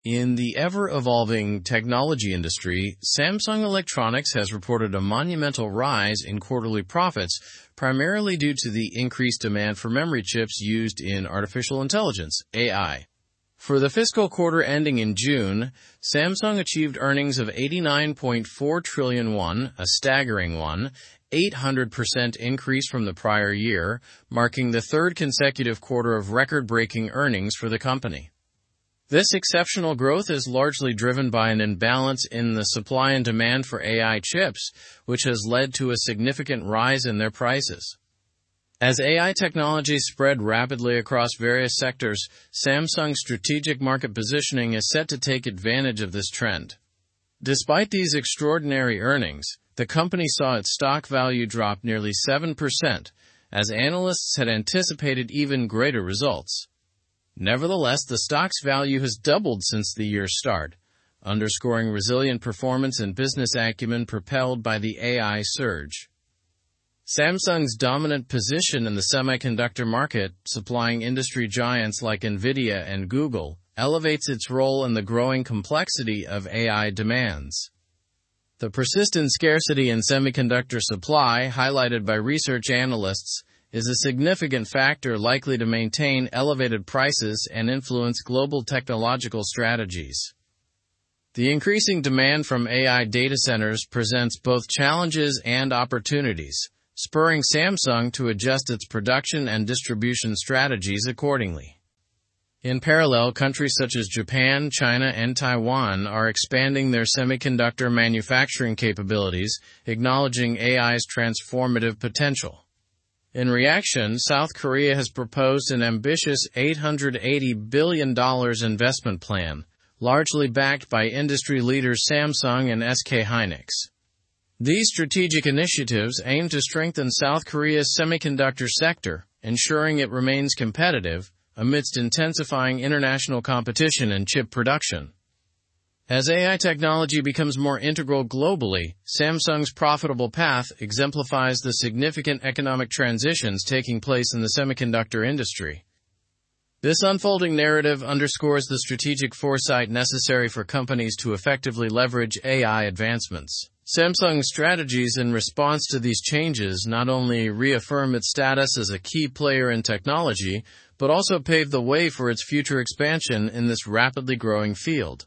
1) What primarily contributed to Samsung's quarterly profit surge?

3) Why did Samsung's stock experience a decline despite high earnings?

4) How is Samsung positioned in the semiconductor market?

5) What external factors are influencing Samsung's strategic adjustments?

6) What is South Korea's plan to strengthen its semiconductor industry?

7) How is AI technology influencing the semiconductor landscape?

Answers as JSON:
{"1": "The demand for AI memory chips primarily contributed to the profit surge.", "3": "Investor expectations were higher than the reported earnings, leading to a stock decline.", "4": "Samsung is a major player and supplier to top technology firms like Nvidia and Google.", "5": "The tightness in semiconductor supply and the demand from AI data centers are major factors.", "6": "South Korea plans to invest $880 billion, primarily through firms like Samsung and SK Hynix.", "7": "AI technology is leading to substantial economic shifts and necessitating strategic foresight."}

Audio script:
In the ever-evolving technology industry, Samsung Electronics has reported a monumental rise in quarterly profits, primarily due to the increased demand for memory chips used in artificial intelligence (AI). For the fiscal quarter ending in June, Samsung achieved earnings of 89.4 trillion won, a staggering 1,800% increase from the prior year, marking the third consecutive quarter of record-breaking earnings for the company. This exceptional growth is largely driven by an imbalance in the supply and demand for AI chips, which has led to a significant rise in their prices.
As AI technologies spread rapidly across various sectors, Samsung's strategic market positioning is set to take advantage of this trend. Despite these extraordinary earnings, the company saw its stock value drop nearly 7%, as analysts had anticipated even greater results. Nevertheless, the stock's value has doubled since the year's start, underscoring resilient performance and business acumen propelled by the AI surge.
Samsung's dominant position in the semiconductor market, supplying industry giants like Nvidia and Google, elevates its role in the growing complexity of AI demands. The persistent scarcity in semiconductor supply, highlighted by research analysts, is a significant factor likely to maintain elevated prices and influence global technological strategies. The increasing demand from AI data centers presents both challenges and opportunities, spurring Samsung to adjust its production and distribution strategies accordingly.
In parallel, countries such as Japan, China, and Taiwan are expanding their semiconductor manufacturing capabilities, acknowledging AI's transformative potential. In reaction, South Korea has proposed an ambitious $880 billion investment plan, largely backed by industry leaders Samsung and SK Hynix. These strategic initiatives aim to strengthen South Korea's semiconductor sector, ensuring it remains competitive amidst intensifying international competition in chip production.
As AI technology becomes more integral globally, Samsung's profitable path exemplifies the significant economic transitions taking place in the semiconductor industry.
path exemplifies the significant economic transitions taking place in the semiconductor industry. This unfolding narrative underscores the strategic foresight necessary for ? to effectively leverage AI advancements. Samsung's strategies in response to these changes not only reaffirm its status as a key player in technology but also pave the way for its future expansion in this rapidly growing field.

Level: Level 4